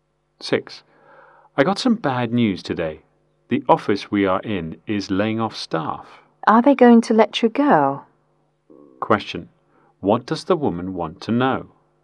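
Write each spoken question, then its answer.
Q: What does the woman want to know?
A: Whether the man will be laid off.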